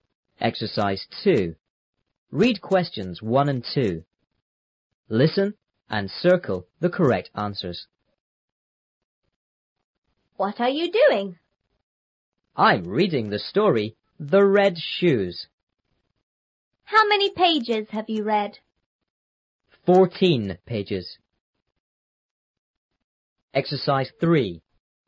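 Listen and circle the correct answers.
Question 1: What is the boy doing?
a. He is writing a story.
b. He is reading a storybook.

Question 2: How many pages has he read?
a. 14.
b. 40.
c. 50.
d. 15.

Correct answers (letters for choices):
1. b
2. a

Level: 初中英语广州版3B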